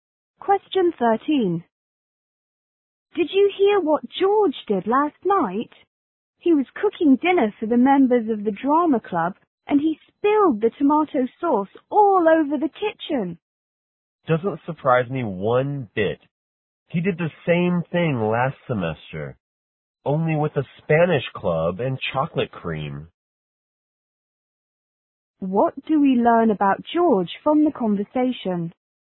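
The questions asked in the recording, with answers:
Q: What do we learn about George from the conversation?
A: He is clumsy; he has spilled food before.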